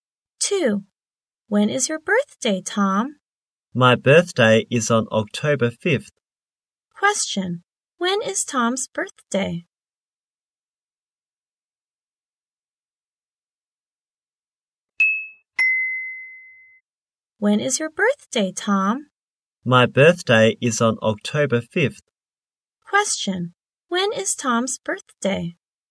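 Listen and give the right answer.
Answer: October 5th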